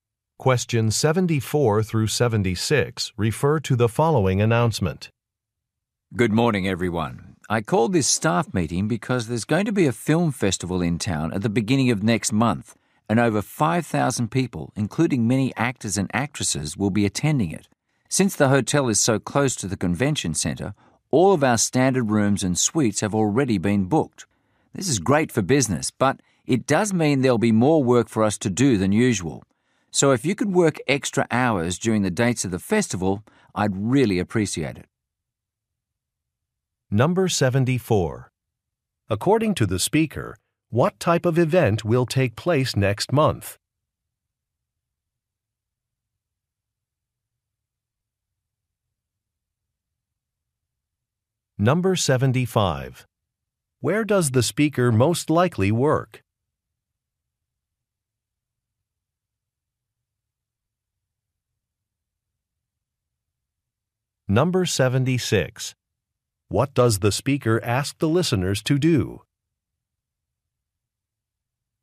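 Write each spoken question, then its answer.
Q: According to the speaker, what type of event will take place next month?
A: A film festival

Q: Where does the speaker most likely work?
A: At a hotel

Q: What does the speaker ask the listeners to do?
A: Work extra hours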